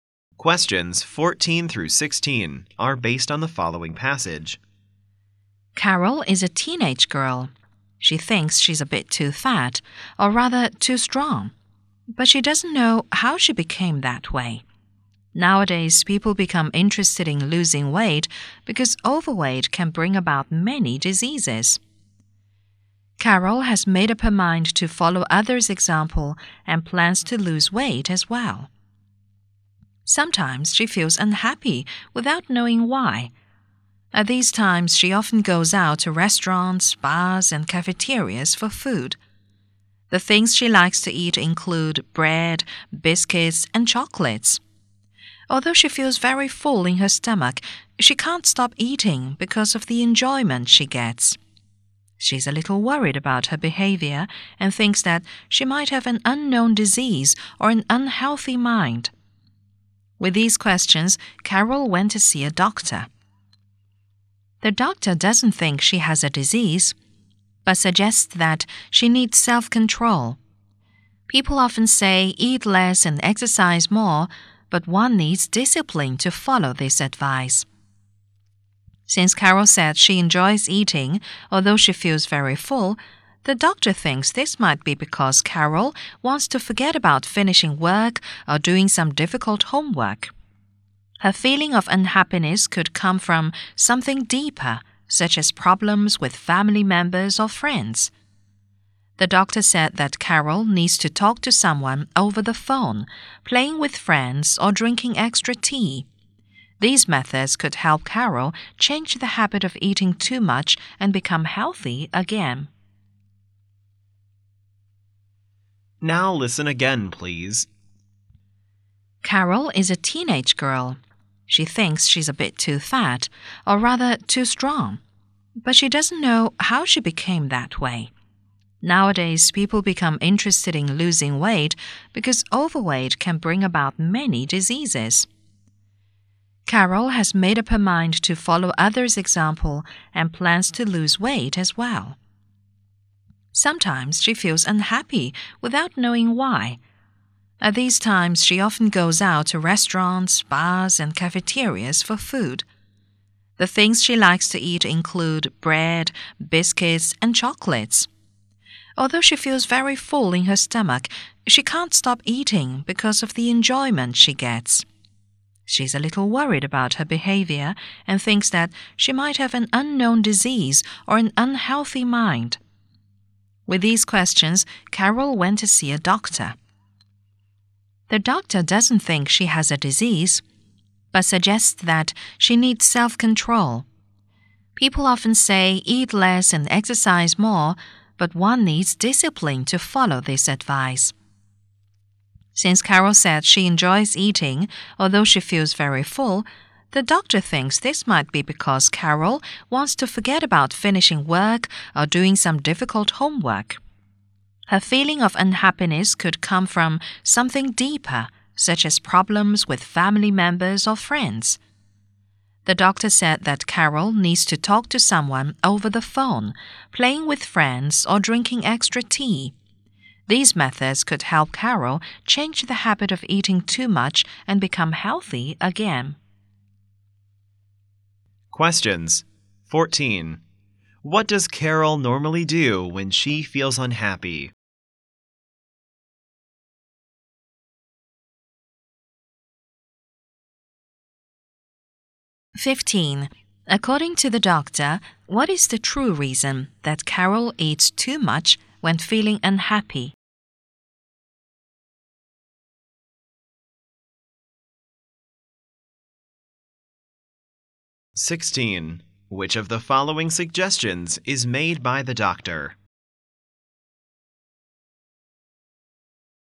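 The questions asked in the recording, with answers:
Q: What does Carol normally do when she feels unhappy?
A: Goes out to restaurants, bars and cafeterias to eat

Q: According to the doctor, what is the true reason that Carol eats too much when feeling unhappy?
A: She wants to forget about unfinished work or difficult homework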